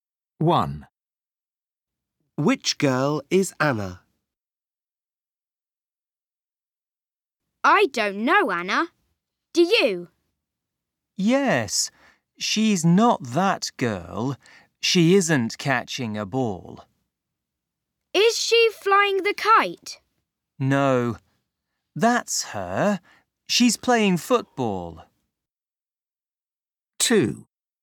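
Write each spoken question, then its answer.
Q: Which girl is Anna?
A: The girl playing football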